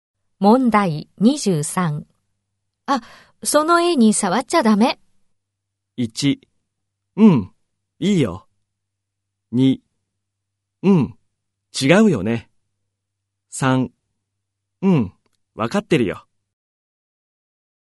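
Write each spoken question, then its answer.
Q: あ、その絵に触っちゃダメ。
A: 3: うん、わかってるよ。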